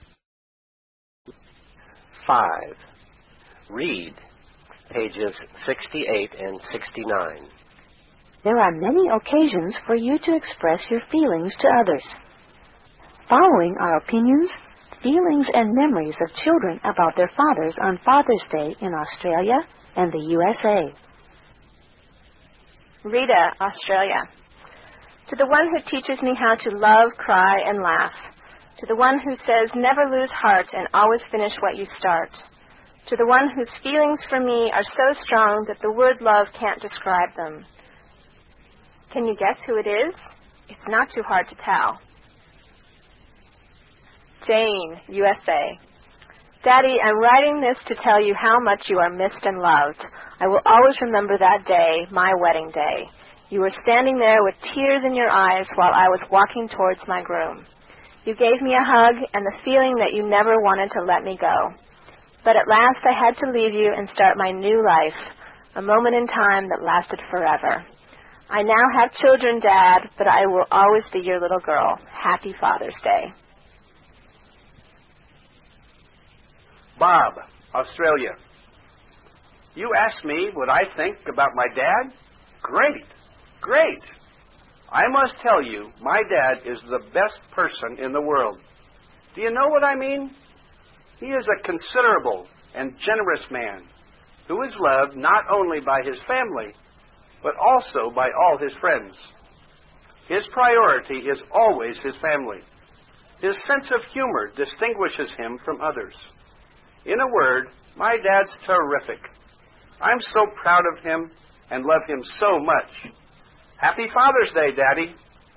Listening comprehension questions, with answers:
Answer. (Trả lời câu hỏi.)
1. Who do you think Rita sends this card to? (Bạn nghĩ rằng Rita sẽ gửi tấm thiệp này đến ai?)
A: I think who Rita sends this card to is her father.

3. What quality makes Bob's father different from others? (Đức tính nào làm cho cha của Bob khác với người khác?)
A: His sense of humor makes Bob's father different from others.

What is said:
There are many occasions for you to express your feelings to others. Following are opinions, feelings and memories of children about their fathers on Father's Day in Australia and the USA.
Rita (Australia)
To the one who teaches me how to love, cry and laugh.
To the one who says never lose heart and always finish what you start.
To the one whose feelings for me are so strong that the word love can't describe them.
Can you guess who it is?
It's not too hard to tell...
Jane (USA)
Daddy, I am writing this to tell you how much you are missed and loved. I will always remember that day - my wedding day. You were standing there with tears in your eyes while I was walking towards my groom. You gave me a hug and the feeling that you never wanted to let me go. But at last, I had to leave you and start my new life... a moment in time that lasted forever. I now have children, Dad, but I will always be your little girl!
Bob (Australia)
You ask me what I think about my dad. Great! Great! I must tell you my dad is the best person in the world. Do you blow what I mean? He is a considerate and generous man who is loved not only by his family but also by all his friends. His priority is always his family. His sense of humor distinguishes him from others. In a word, my dad's terrific! I'm so proud of him and love him so much.

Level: Tiếng Anh 9